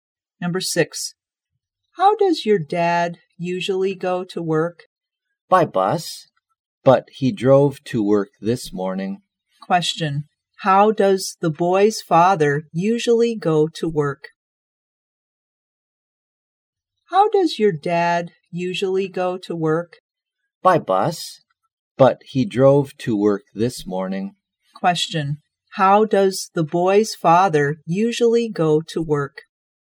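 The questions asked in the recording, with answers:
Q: how does the boy's father usually go to work?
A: By bus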